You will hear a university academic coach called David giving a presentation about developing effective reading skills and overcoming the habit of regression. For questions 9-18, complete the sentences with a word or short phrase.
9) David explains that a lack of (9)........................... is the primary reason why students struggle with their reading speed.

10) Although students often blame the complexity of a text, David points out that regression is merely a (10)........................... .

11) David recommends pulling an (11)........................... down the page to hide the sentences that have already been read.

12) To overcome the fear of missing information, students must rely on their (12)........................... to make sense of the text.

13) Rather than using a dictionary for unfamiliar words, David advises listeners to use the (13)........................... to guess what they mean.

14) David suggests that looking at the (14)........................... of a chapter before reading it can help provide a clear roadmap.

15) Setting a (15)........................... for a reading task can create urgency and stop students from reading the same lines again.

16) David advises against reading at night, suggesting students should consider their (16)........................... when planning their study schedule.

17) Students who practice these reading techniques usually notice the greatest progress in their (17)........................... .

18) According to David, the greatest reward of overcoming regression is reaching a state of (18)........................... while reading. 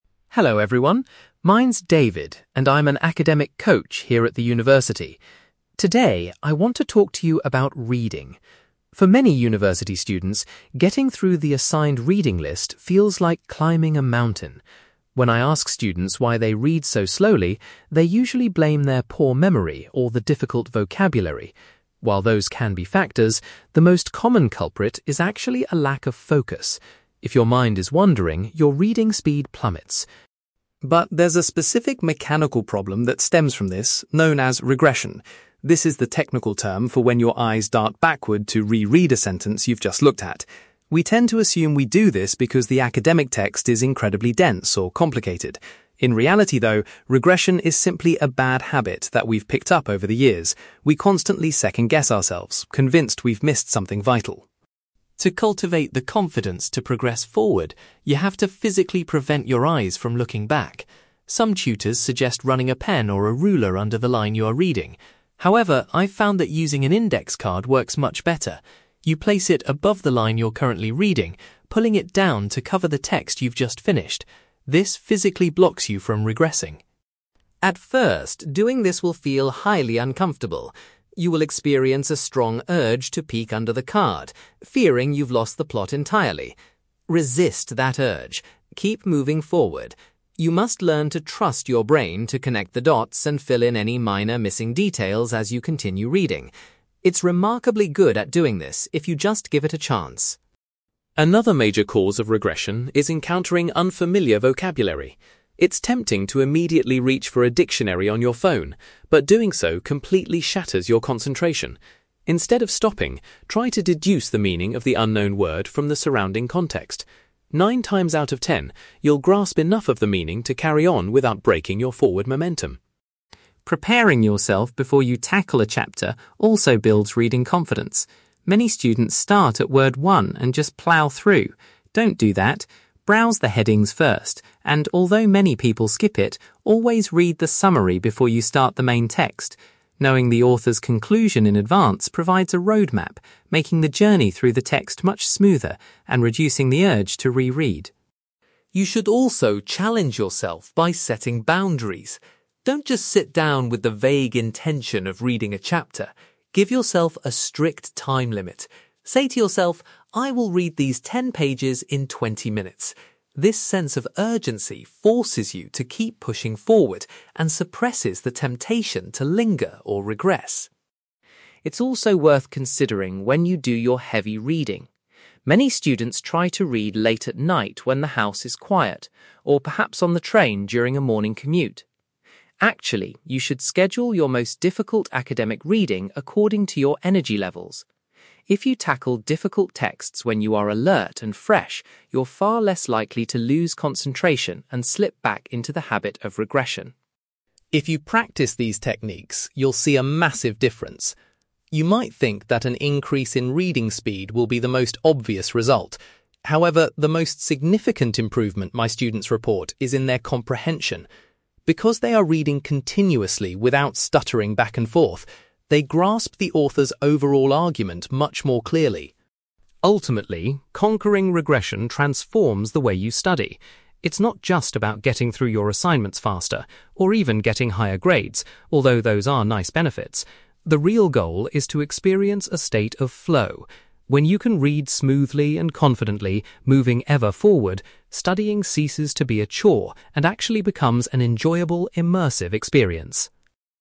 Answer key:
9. focus
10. habit
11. index card
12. brain
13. context
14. summary
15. time limit
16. energy levels
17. comprehension
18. flow

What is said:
David: Hello everyone. My name's David, and I'm an academic coach here at the university. Today, I want to talk to you about reading. For many university students, getting through the assigned reading list feels like climbing a mountain. When I ask students why they read so slowly, they usually blame their poor memory or the difficult vocabulary. While those can be factors, the most common culprit is actually a lack of focus. If your mind is wandering, your reading speed plummets.
But there's a specific mechanical problem that stems from this, known as regression. This is the technical term for when your eyes dart backward to re-read a sentence you've just looked at. We tend to assume we do this because the academic text is incredibly dense or complicated. In reality, though, regression is simply a bad habit that we've picked up over the years. We constantly second-guess ourselves, convinced we've missed something vital.
To cultivate the confidence to progress forward, you have to physically prevent your eyes from looking back. Some tutors suggest running a pen or a ruler under the line you are reading. However, I've found that using an index card works much better. You place it above the line you're currently reading, pulling it down to cover the text you've just finished. This physically blocks you from regressing.
At first, doing this will feel highly uncomfortable. You will experience a strong urge to peek under the card, fearing you've lost the plot entirely. Resist that urge! Keep moving forward. You must learn to trust your brain to connect the dots and fill in any minor missing details as you continue reading. It's remarkably good at doing this if you just give it a chance.
Another major cause of regression is encountering unfamiliar vocabulary. It's tempting to immediately reach for a dictionary on your phone, but doing so completely shatters your concentration. Instead of stopping, try to deduce the meaning of the unknown word from the surrounding context. Nine times out of ten, you'll grasp enough of the meaning to carry on without breaking your forward momentum.
Preparing yourself before you tackle a chapter also builds reading confidence. Many students start at word one and just plough through. Don't do that. Browse the headings first, and although many people skip it, always read the summary before you start the main text. Knowing the author's conclusion in advance provides a roadmap, making the journey through the text much smoother and reducing the urge to re-read.
You should also challenge yourself by setting boundaries. Don't just sit down with the vague intention of reading a chapter. Give yourself a strict time limit. Say to yourself, "I will read these ten pages in twenty minutes." This sense of urgency forces you to keep pushing forward and suppresses the temptation to linger or regress.
It's also worth considering when you do your heavy reading. Many students try to read late at night when the house is quiet, or perhaps on the train during a morning commute. Actually, you should schedule your most difficult academic reading according to your energy levels. If you tackle difficult texts when you are alert and fresh, you're far less likely to lose concentration and slip back into the habit of regression.
If you practise these techniques, you'll see a massive difference. You might think that an increase in reading speed will be the most obvious result. However, the most significant improvement my students report is in their comprehension. Because they are reading continuously without stuttering back and forth, they grasp the author's overall argument much more clearly.
Ultimately, conquering regression transforms the way you study. It's not just about getting through your assignments faster, or even getting higher grades, although those are nice benefits! The real goal is to experience a state of flow. When you can read smoothly and confidently, moving ever forward, studying ceases to be a chore and actually becomes an enjoyable, immersive experience.

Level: B2